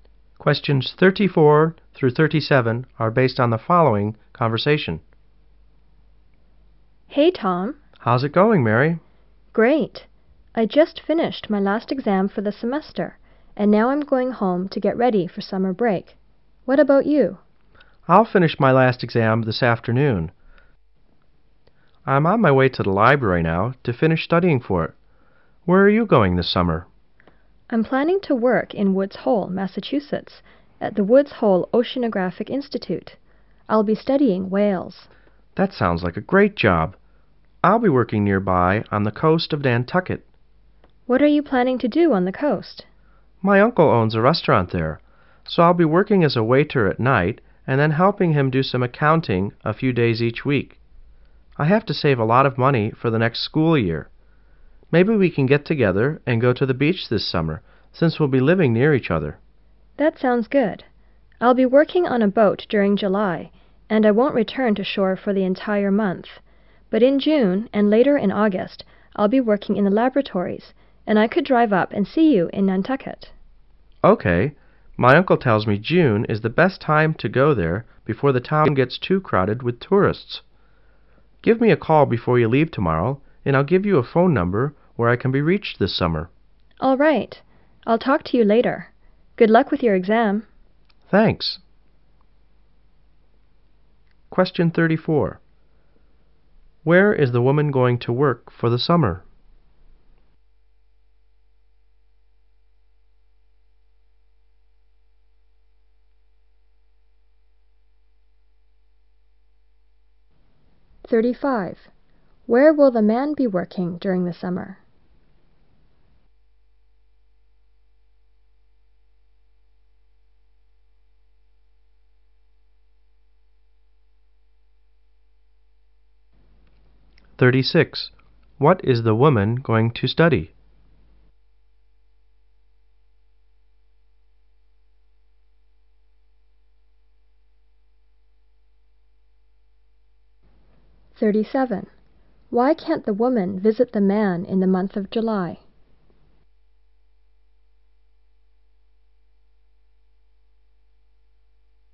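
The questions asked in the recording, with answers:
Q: Where is the woman going to work for the summer?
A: At the Woods Hole Oceanographic Institute

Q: Where will the man be working during the summer?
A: At his uncle's restaurant on the coast of Nantucket

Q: What is the woman going to study?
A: Whales

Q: Why can't the woman visit the man in the month of July?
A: She will be working on a boat all month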